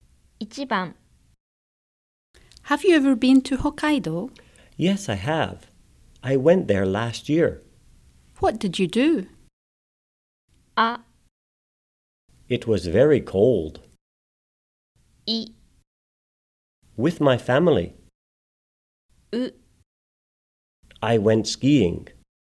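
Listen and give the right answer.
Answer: う: I went skiing.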